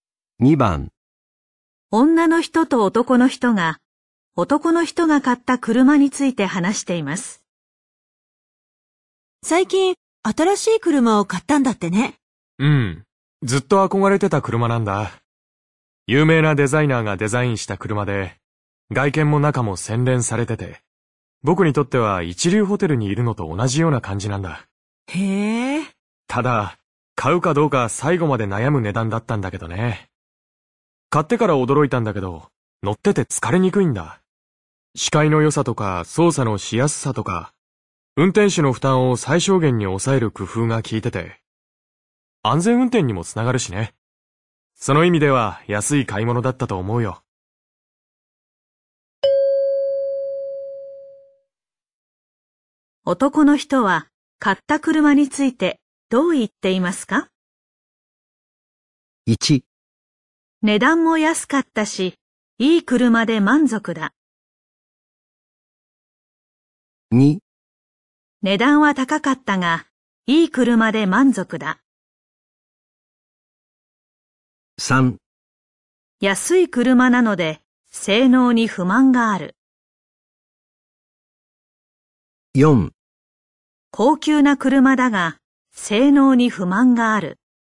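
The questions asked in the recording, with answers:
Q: 男の人は買った車についてどう言っていますか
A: 2: 値段は高かったが、いい車で満足だ。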